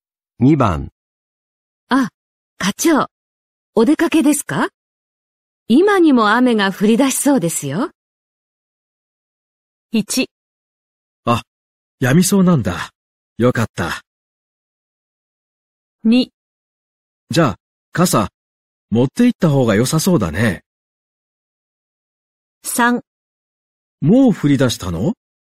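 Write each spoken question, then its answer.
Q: あ、課長、お出かけですか?今にも雨が降り出しそうですよ。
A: 2: じゃあ、傘、持って行った方が良さそうだね。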